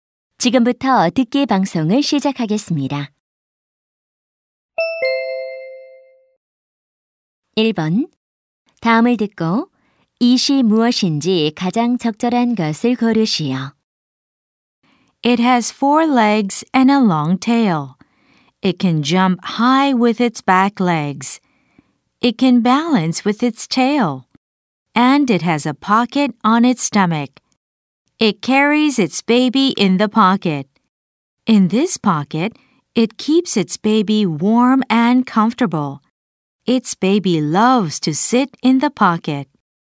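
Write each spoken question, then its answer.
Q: 다음을 듣고 이시 무엇인지 가장 적절한 것을 고르시오.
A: 캥거루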